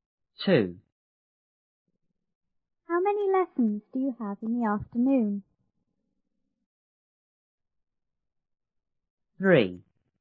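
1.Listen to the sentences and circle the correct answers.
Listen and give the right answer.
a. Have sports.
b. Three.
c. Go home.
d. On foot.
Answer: b. Three.

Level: 初中英语广州版1B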